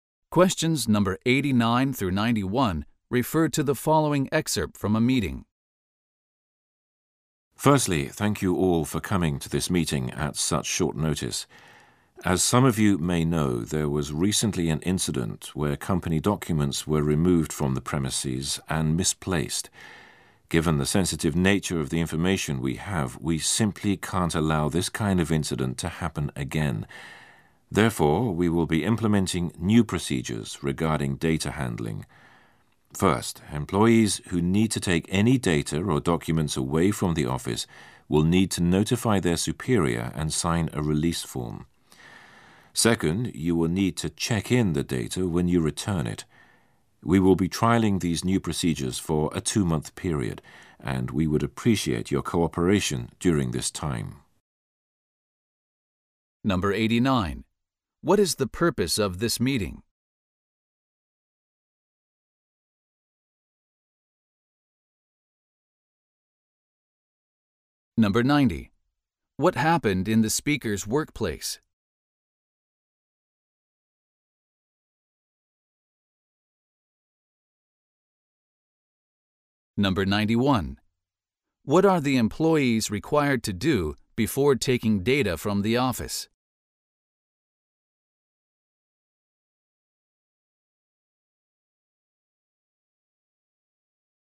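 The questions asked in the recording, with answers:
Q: What is the purpose of this meeting?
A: To announce new data-handling procedures

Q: What happened in the speaker's workplace?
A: Company documents were removed from the premises and misplaced

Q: What are the employees required to do before taking data from the office?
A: Notify their superior and sign a release form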